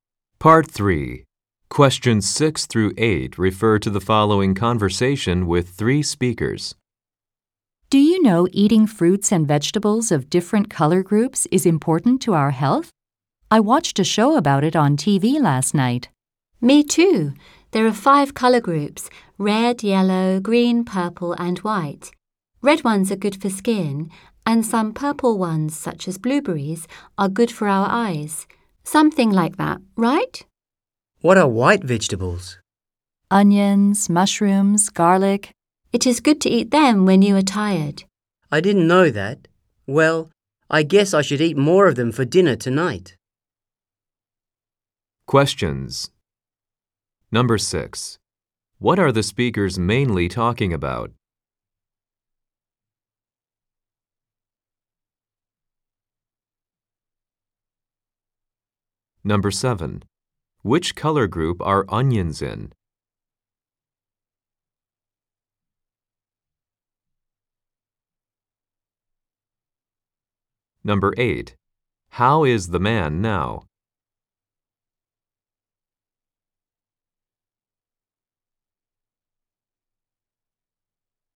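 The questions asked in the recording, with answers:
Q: What are the speakers mainly talking about?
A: Eating fruits and vegetables of different color groups for health

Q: Which color group are onions in?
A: White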